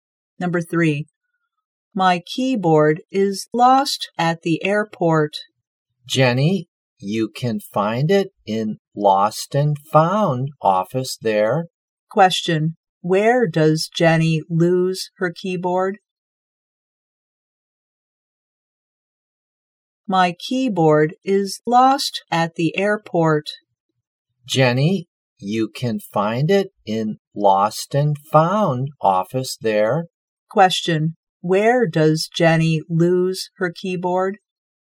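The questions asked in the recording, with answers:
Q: where does Jenny lose her keyboard?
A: At the airport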